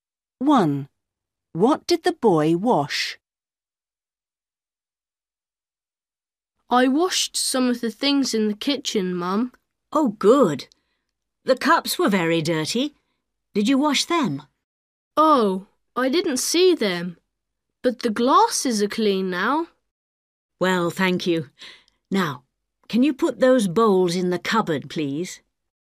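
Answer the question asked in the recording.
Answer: the glasses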